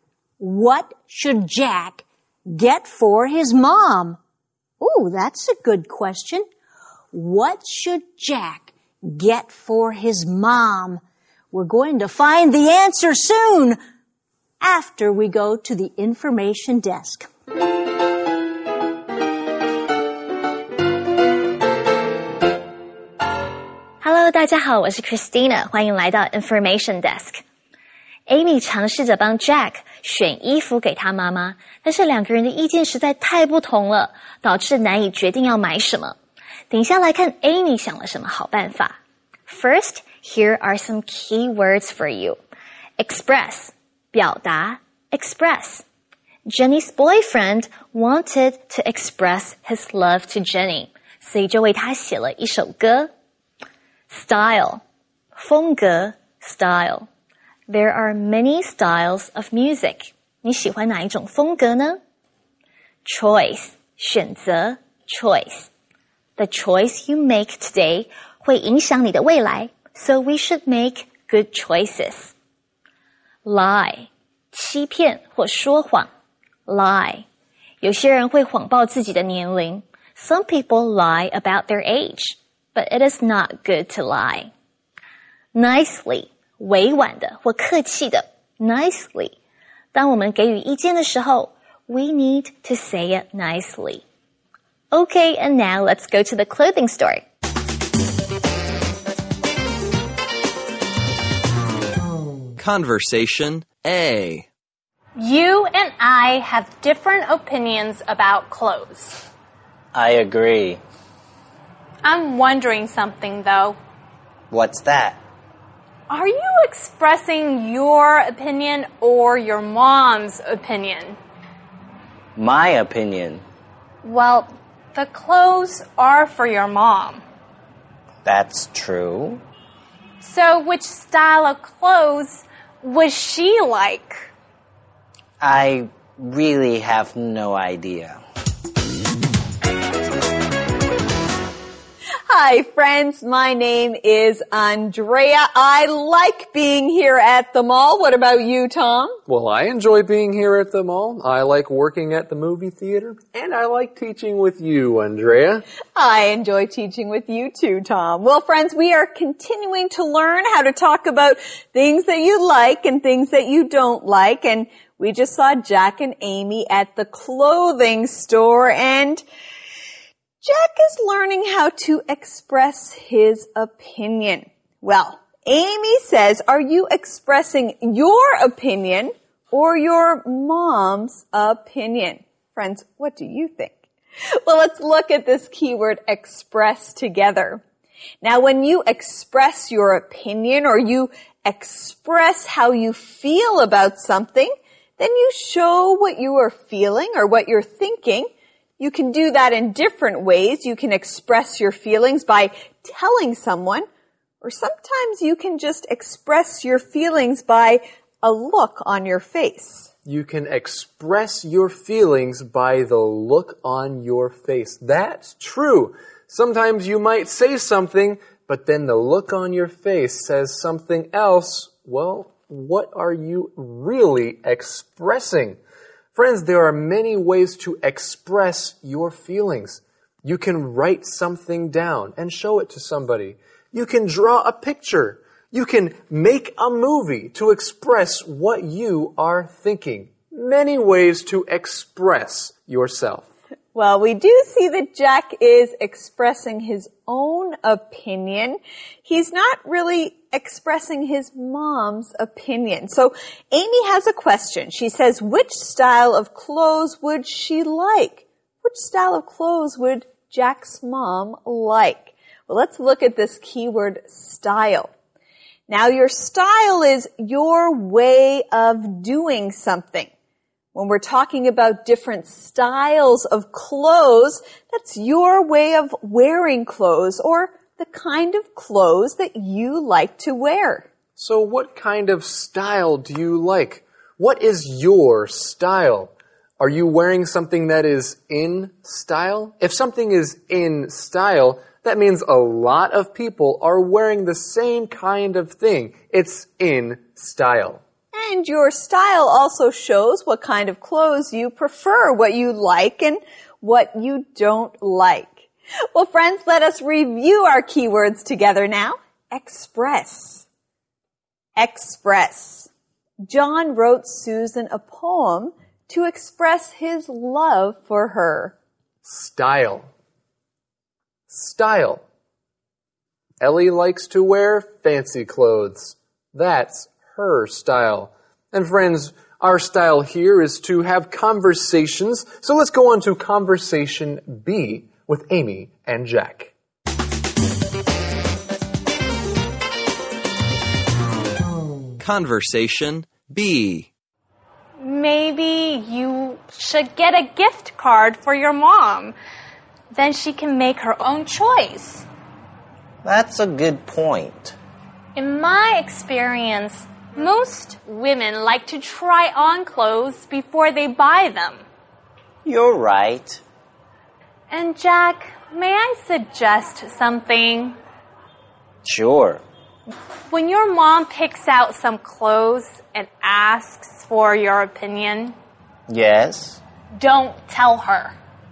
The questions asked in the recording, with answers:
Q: What should Jack get for his mom?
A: Amy thinks Jack should get a gift card for his mom.